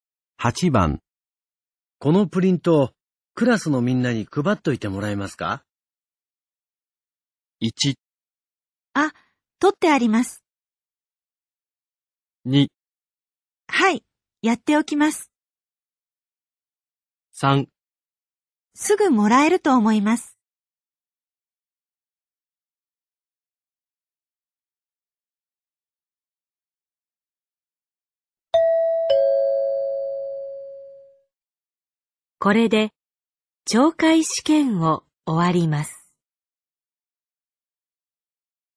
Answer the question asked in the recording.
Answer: 2

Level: N3 Listening · Test 15